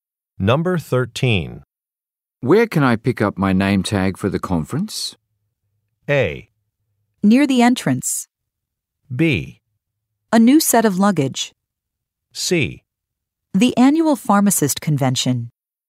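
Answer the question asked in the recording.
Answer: A: Near the entrance.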